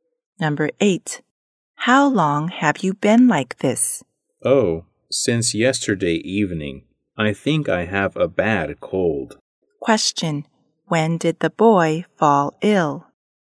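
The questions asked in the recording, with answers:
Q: when did the boy fall ill?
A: Yesterday evening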